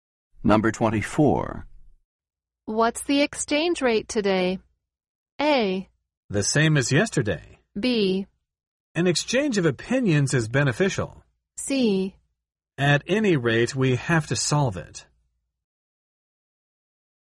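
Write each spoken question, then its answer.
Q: What's the exchange rate today?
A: A: The same as yesterday.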